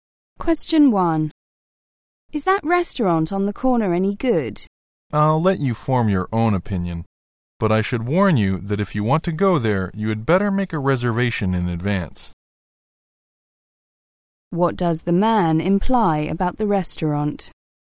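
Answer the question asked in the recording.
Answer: It is popular; reservations are needed in advance.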